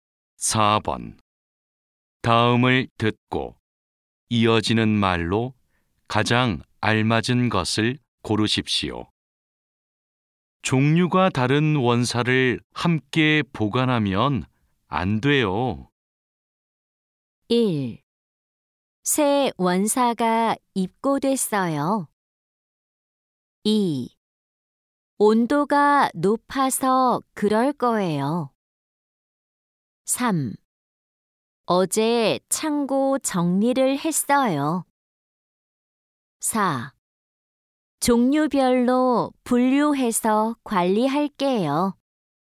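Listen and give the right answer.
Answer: 4: 종류별로 분류해서 관리할게요.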